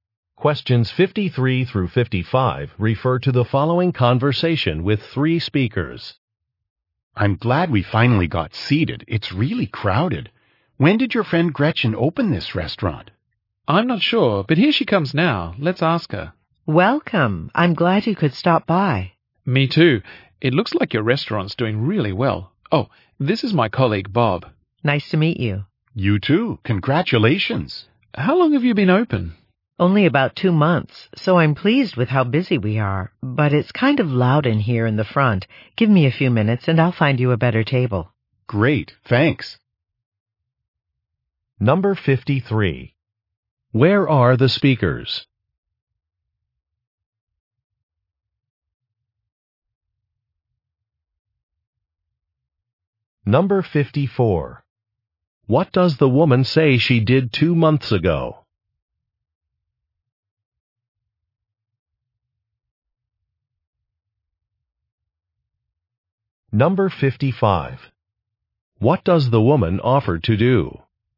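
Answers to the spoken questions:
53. In a restaurant
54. Opened the restaurant
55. Find them a better table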